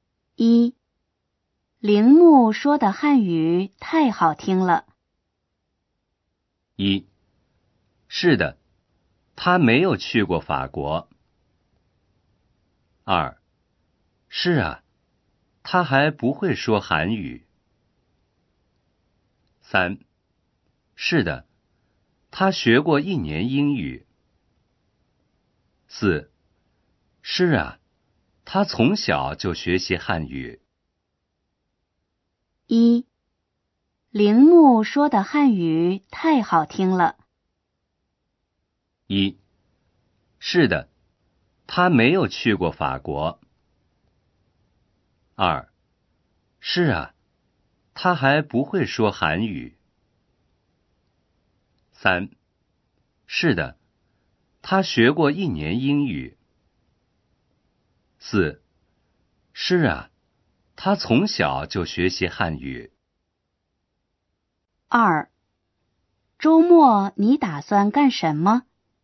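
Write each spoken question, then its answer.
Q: 铃木说的汉语太好听了。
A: 4: 是啊,他从小就学习汉语。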